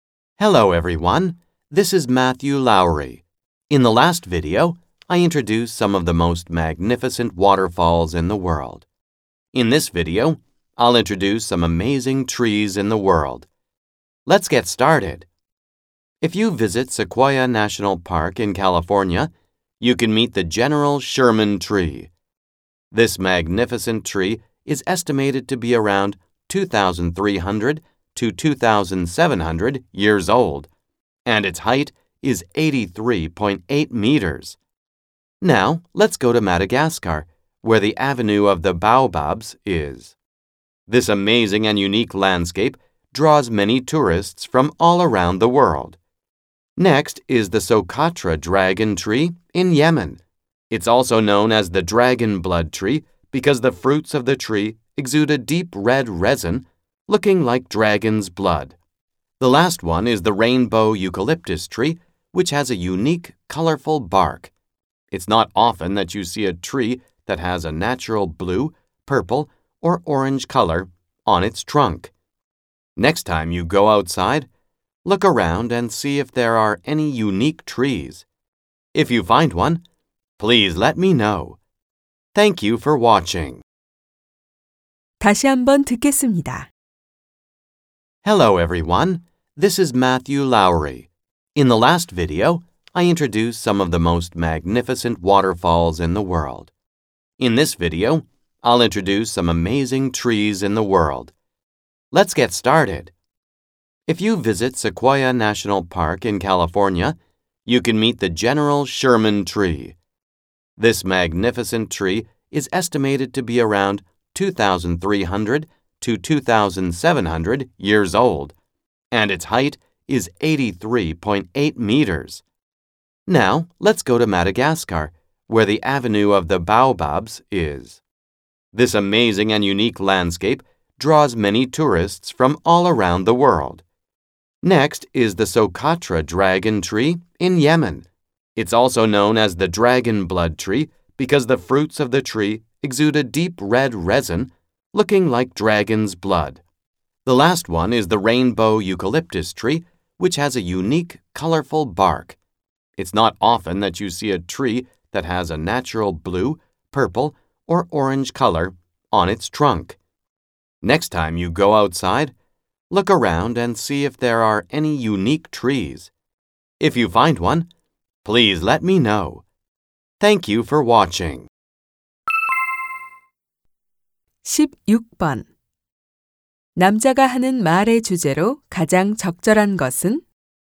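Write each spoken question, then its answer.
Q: 남자가 하는 말의 주제로 가장 적절한 것은?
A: 세계의 놀라운 나무들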